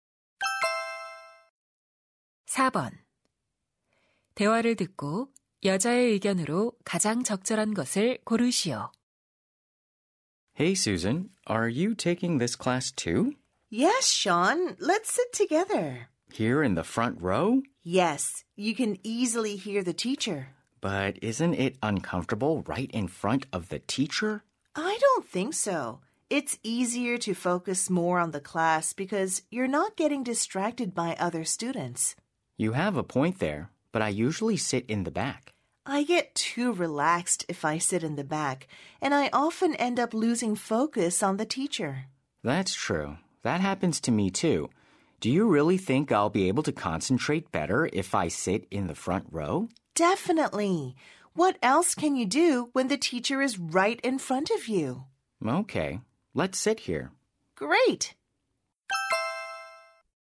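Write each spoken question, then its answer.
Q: 대화를 듣고 여자의 의견으로 가장 적절한 것을 고르시오.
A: 앞줄에 앉으면 수업에 더 집중할 수 있다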